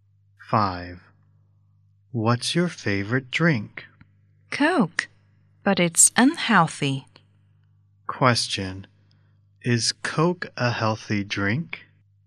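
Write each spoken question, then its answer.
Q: Question. Is Coke a healthy drink?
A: No, it isn't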